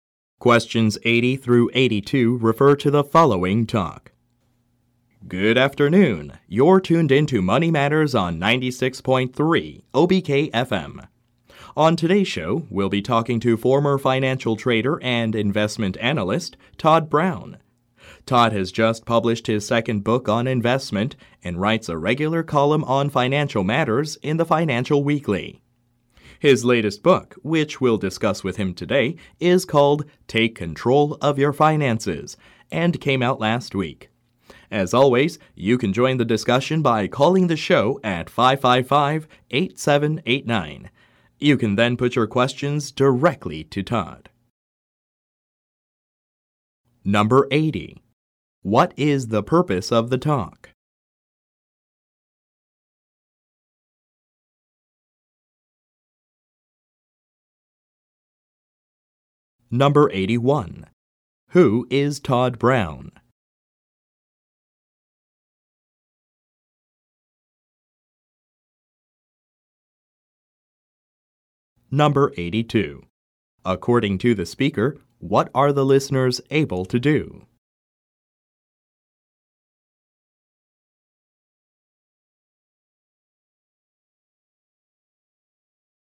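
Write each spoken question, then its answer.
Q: What is the purpose of the talk?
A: To introduce a guest on a radio show

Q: Who is Todd Brown?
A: A former financial trader and investment analyst who writes books

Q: According to the speaker, what are the listeners able to do?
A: Call the show and ask Todd questions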